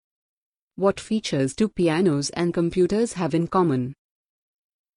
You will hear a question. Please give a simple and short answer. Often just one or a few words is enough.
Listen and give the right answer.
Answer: A keyboard